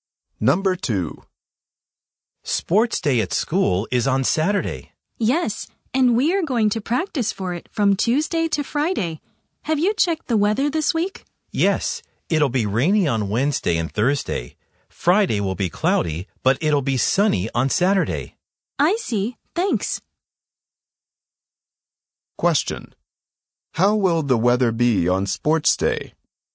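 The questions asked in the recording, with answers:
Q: How will the weather be on sports day?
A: Sunny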